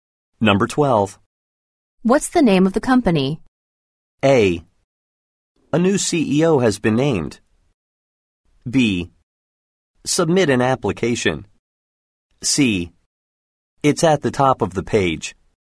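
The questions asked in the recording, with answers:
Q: What's the name of the company?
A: C: It's at the top of the page.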